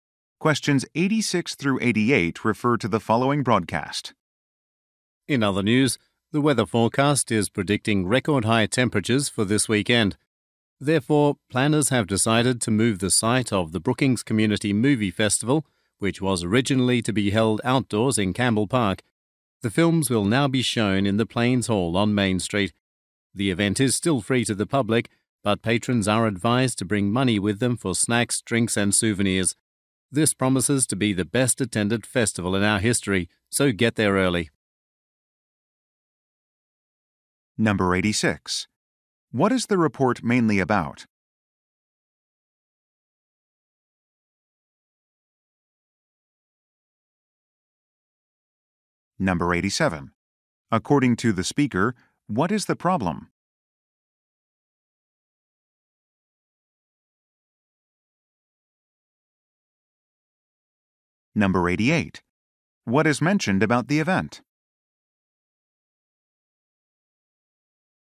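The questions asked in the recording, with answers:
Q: What is the report mainly about?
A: A change of location for a movie festival

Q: According to the speaker, what is the problem?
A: Very high temperatures are expected

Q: What is mentioned about the event?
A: It is free to the public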